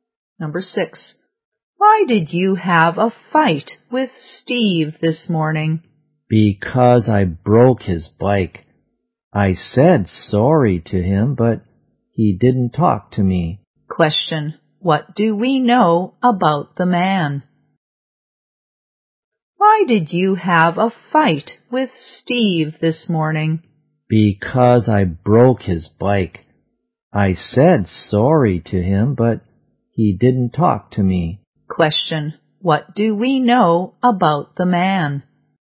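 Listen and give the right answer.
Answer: He broke Steve's bike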